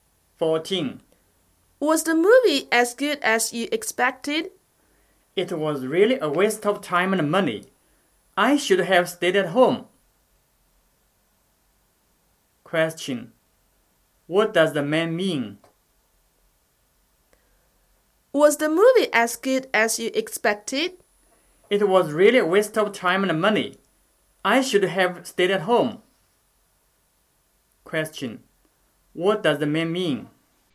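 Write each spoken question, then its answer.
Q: What does the man mean?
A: The movie was disappointing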